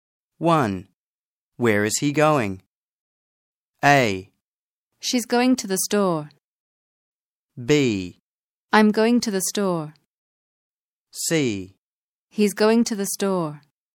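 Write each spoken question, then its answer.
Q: Where is he going?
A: C: He's going to the store.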